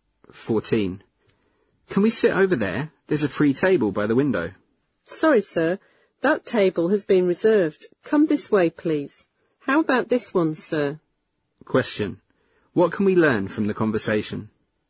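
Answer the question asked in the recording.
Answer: They can't sit at the window table because it is reserved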